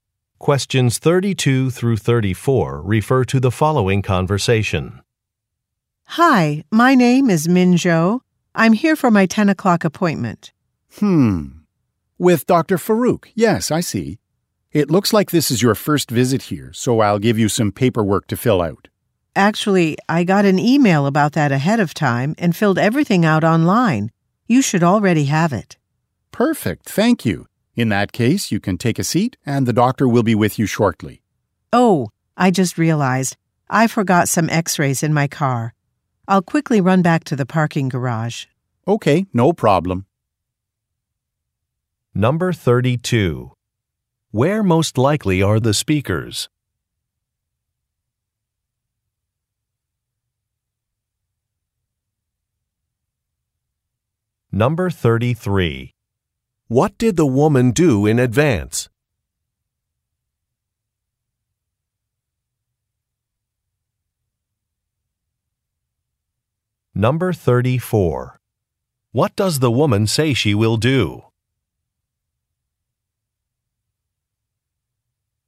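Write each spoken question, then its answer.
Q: Where most likely are the speakers?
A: At a doctor's office

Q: What did the woman do in advance?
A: She filled out the paperwork online

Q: What does the woman say she will do?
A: Go back to her car in the parking garage to get some x-rays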